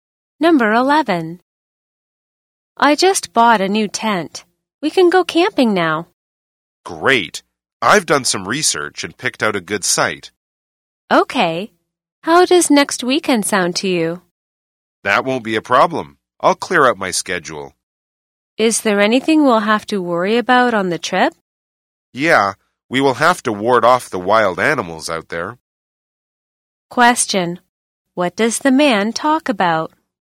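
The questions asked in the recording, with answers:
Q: What does the man talk about?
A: Needing to ward off wild animals on the camping trip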